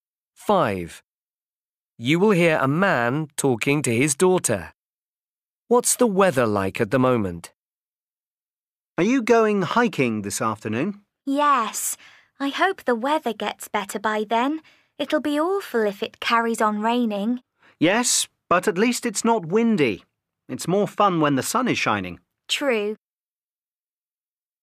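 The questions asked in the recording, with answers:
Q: What's the weather like at the moment?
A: it's raining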